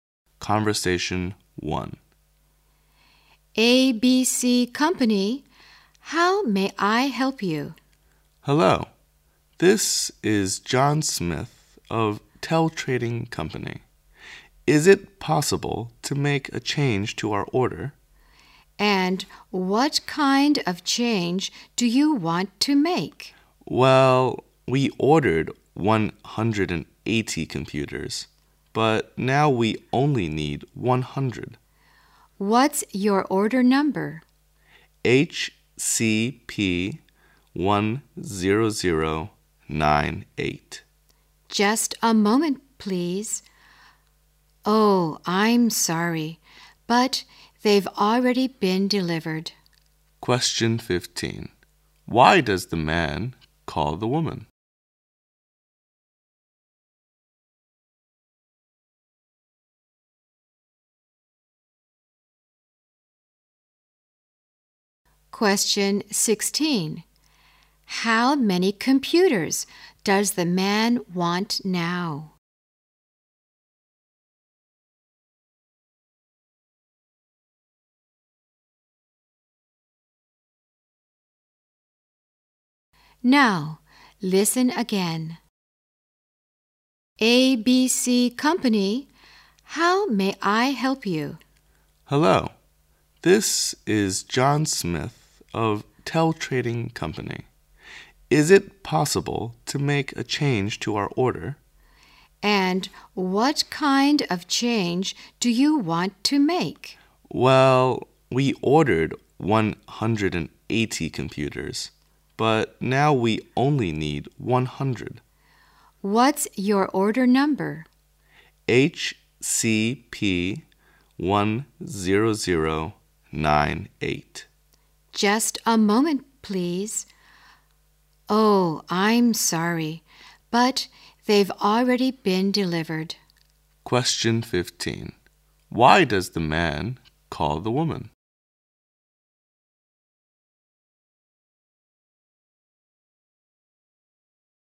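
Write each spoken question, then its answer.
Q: Why does the man call the woman?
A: To change his order

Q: How many computers does the man want now?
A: 100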